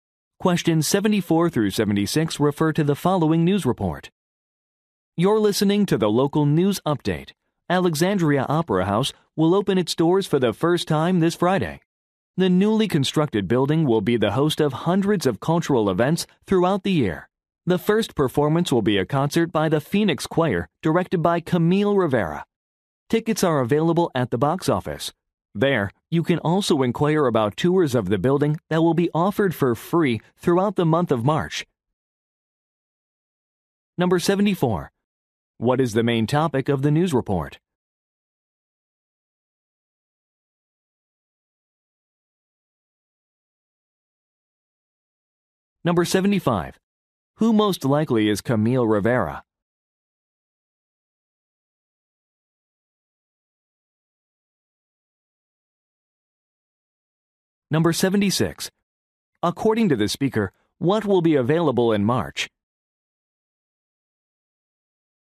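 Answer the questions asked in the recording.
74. The opening of a new opera house
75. A choir director
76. Free tours of the building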